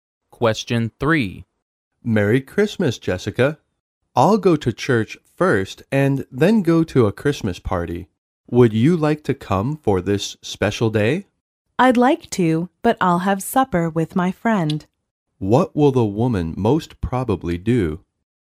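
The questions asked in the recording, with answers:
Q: What will the woman most probably do?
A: Have supper with her friend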